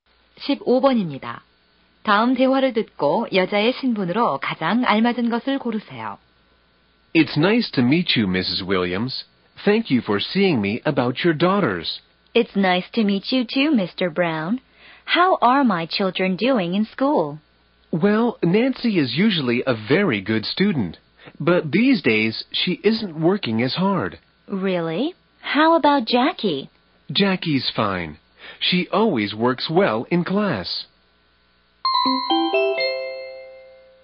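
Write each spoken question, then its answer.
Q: 다음 대화를 듣고 여자의 신분으로 가장 알맞은 것을 고르세요.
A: 학생의 어머니(학부모)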